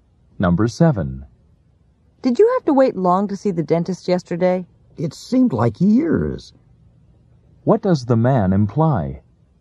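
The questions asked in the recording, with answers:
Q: What does the man imply?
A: He had to wait a very long time.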